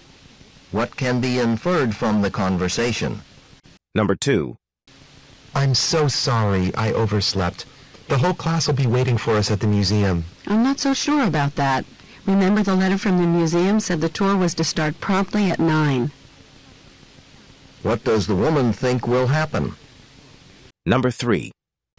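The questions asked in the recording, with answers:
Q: What does the woman think will happen?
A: The tour will start on time without them.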